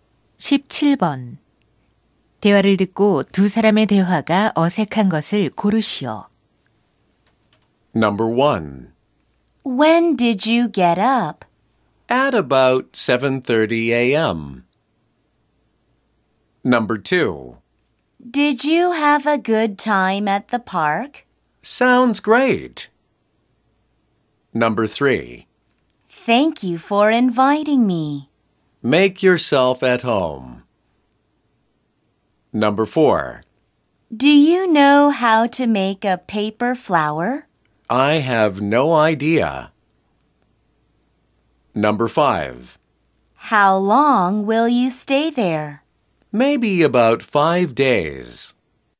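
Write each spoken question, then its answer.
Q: 대화를 듣고 두 사람의 대화가 어색한 것을 고르시오.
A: 2: Did you have a good time at the park? / Sounds great.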